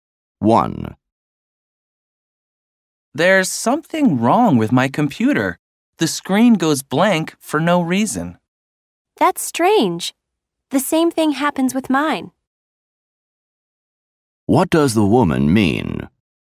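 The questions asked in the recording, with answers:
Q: What does the woman mean?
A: Her computer has the same problem.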